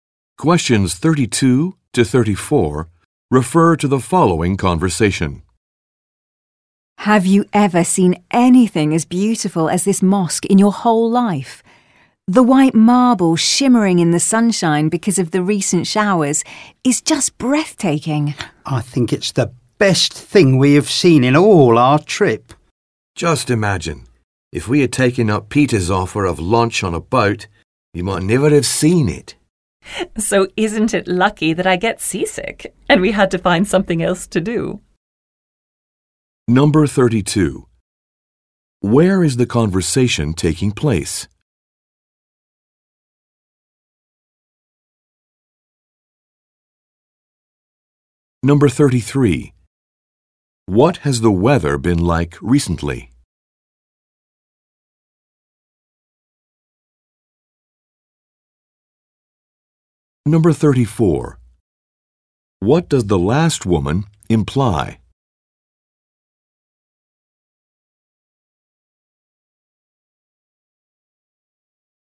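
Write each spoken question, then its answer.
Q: Where is the conversation taking place?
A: At a mosque

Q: What has the weather been like recently?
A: Showery (there were recent showers)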